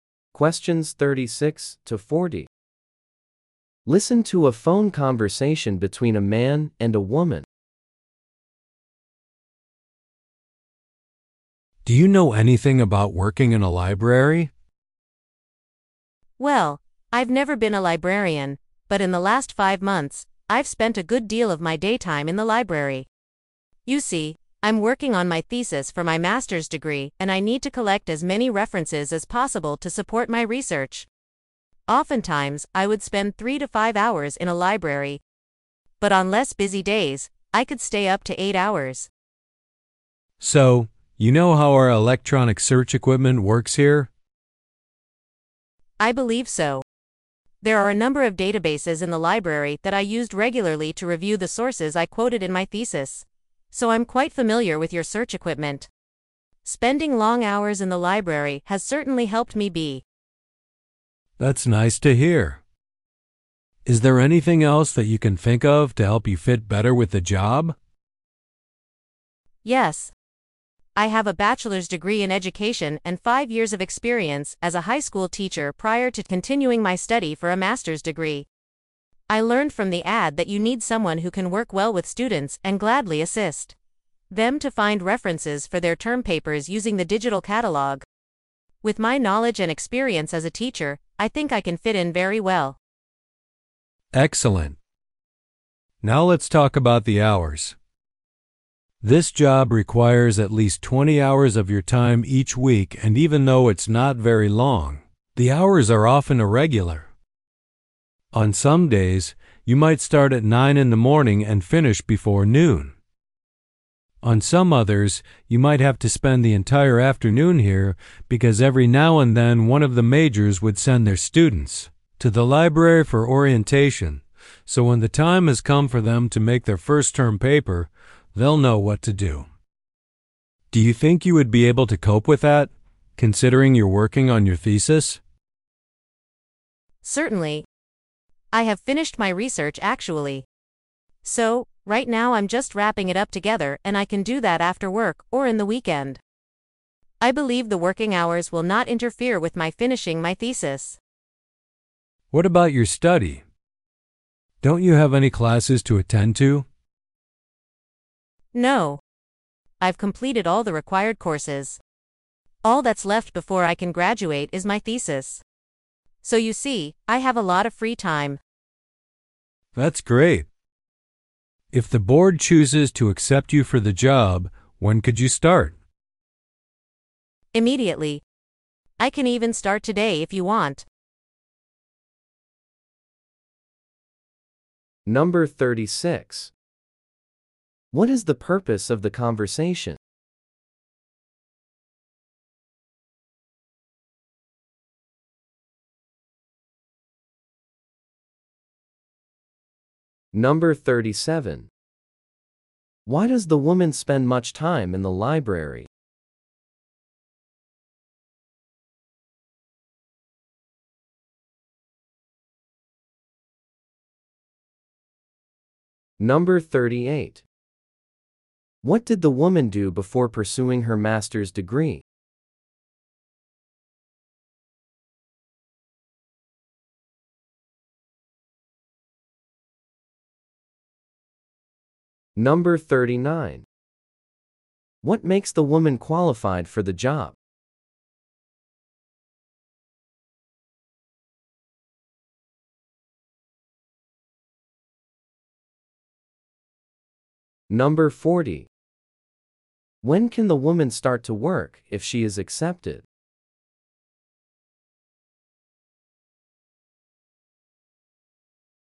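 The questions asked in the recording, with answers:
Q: What is the purpose of the conversation?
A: A job interview for a library position.

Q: Why does the woman spend much time in the library?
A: To collect references for her master's thesis.

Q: What did the woman do before pursuing her master's degree?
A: She was a high school teacher.

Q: What makes the woman qualified for the job?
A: Her teaching experience and her familiarity with the library's search equipment.

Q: When can the woman start to work if she is accepted?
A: Immediately.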